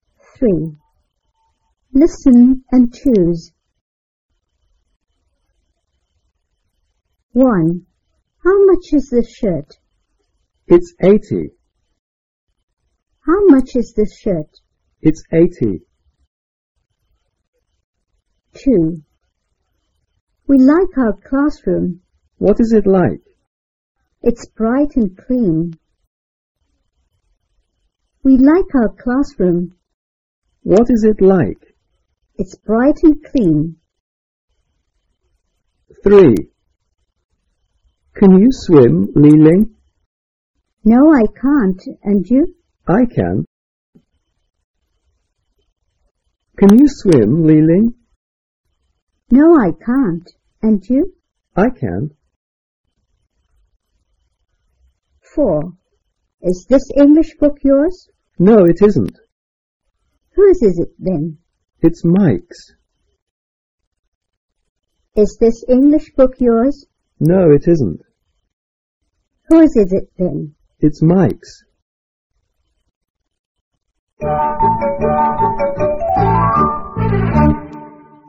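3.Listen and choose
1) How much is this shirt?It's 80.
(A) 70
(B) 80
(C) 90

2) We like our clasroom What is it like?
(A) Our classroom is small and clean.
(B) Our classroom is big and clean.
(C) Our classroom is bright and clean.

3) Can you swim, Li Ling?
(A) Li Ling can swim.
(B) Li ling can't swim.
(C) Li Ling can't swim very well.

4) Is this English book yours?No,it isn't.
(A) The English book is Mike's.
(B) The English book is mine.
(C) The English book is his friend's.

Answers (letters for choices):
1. B
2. C
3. B
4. A

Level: 三年级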